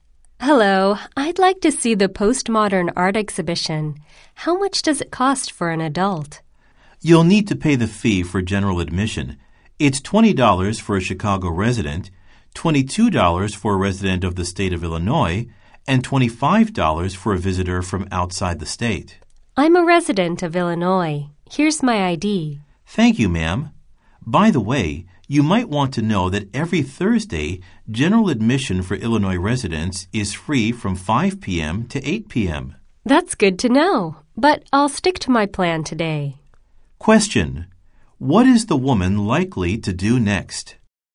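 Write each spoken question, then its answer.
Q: What is the woman likely to do next?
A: Pay $22 for general admission and see the exhibition today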